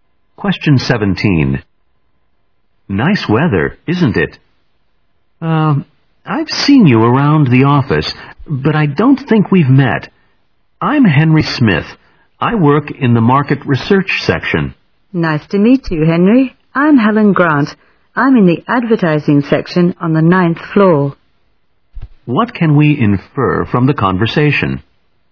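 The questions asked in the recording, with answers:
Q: What can we infer from the conversation?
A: They work in the same building but had not met before.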